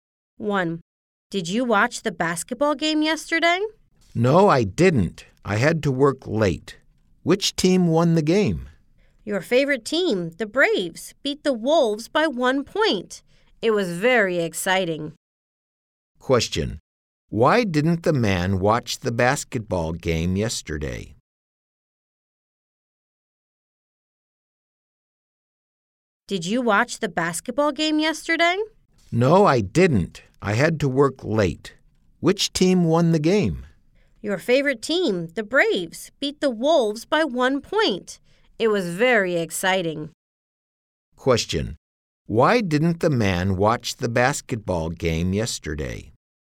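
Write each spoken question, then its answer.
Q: Why didn't the man watch the basketball game yesterday?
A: He had to work late.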